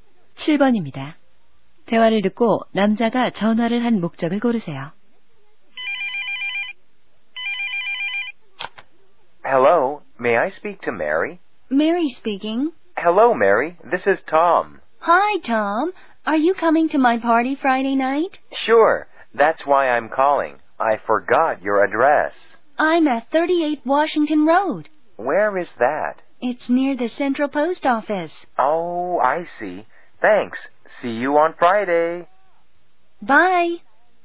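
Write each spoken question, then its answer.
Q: 대화를 듣고 남자가 전화를 한 목적을 고르세요.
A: 파티 장소 주소를 물어보려고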